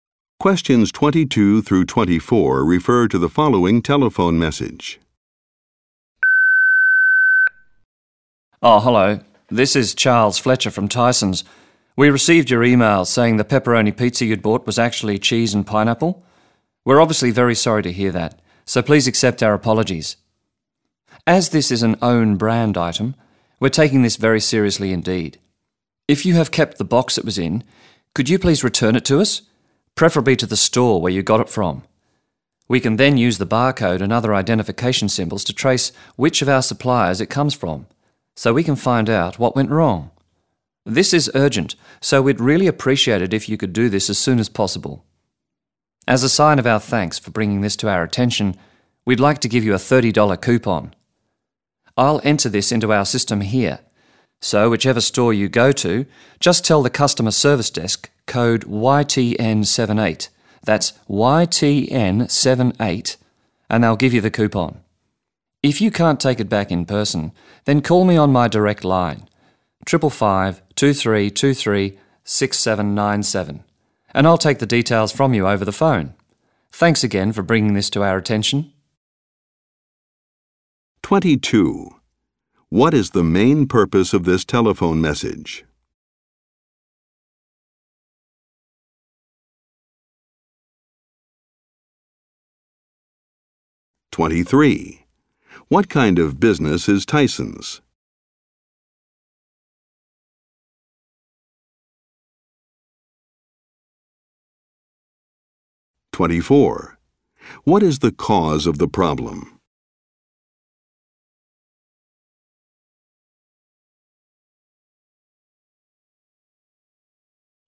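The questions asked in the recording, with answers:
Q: What is the cause of the problem?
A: The pizza was the wrong kind: cheese and pineapple, not pepperoni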